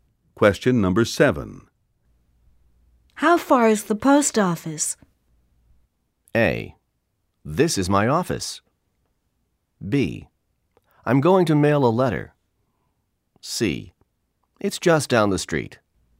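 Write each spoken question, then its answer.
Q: How far is the post office?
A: C: It's just down the street.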